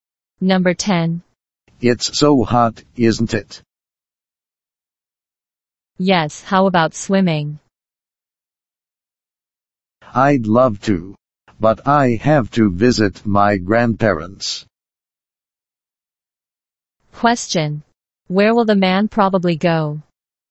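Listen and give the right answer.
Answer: To his grandparents' home.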